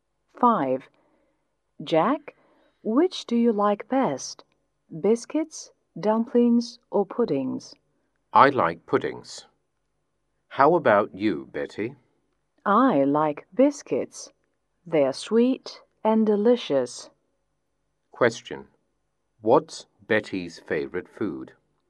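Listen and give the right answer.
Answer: Biscuits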